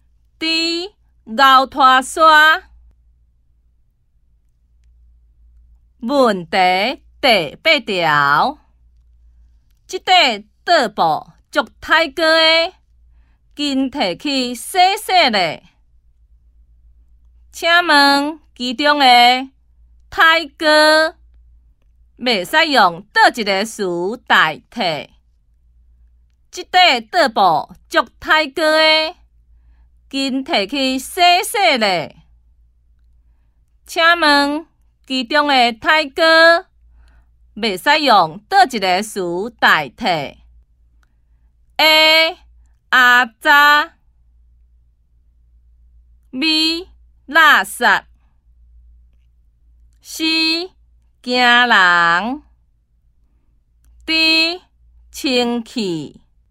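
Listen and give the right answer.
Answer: B: 垃圾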